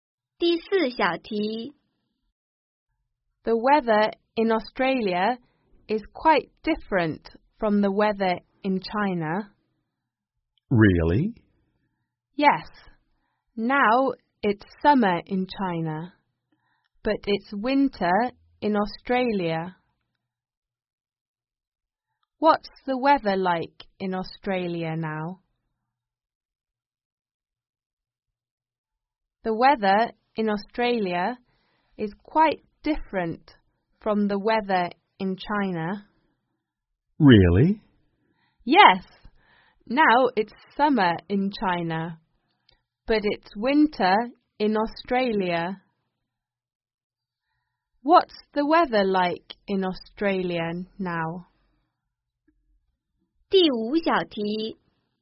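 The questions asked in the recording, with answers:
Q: What's the weather like in Australia now?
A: It's winter there.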